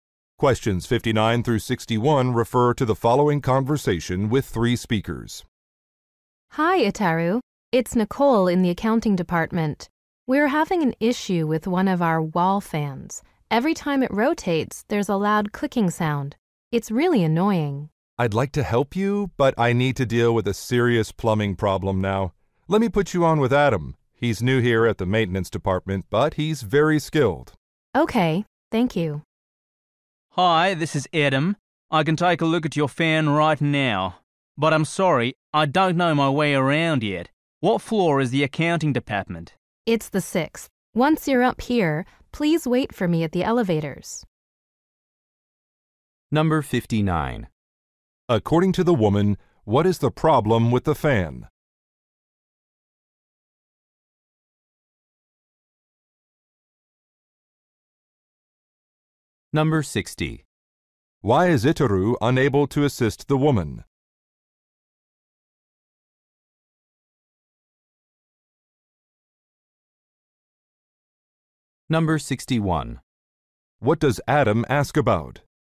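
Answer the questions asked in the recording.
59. It makes a loud clicking sound.
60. He has to deal with a plumbing problem.
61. Which floor the accounting department is on.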